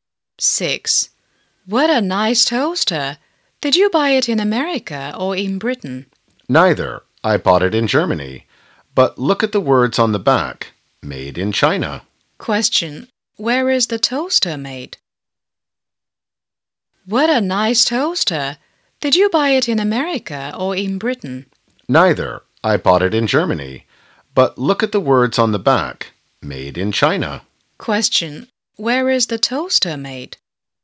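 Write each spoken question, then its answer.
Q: Where is the toaster made?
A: In China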